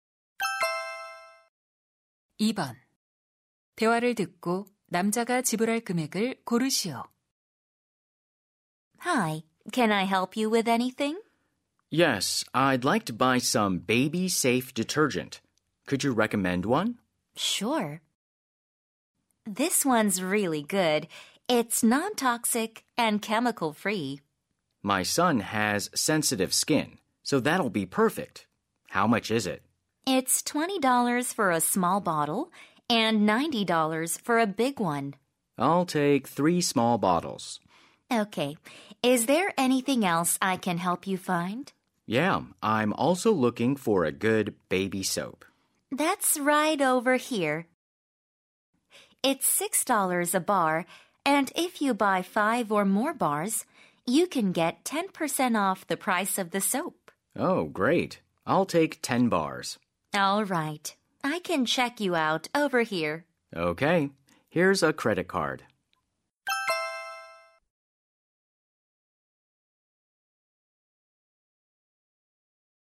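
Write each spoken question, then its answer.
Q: 대화를 듣고 남자가 지불할 금액을 고르시오.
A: $114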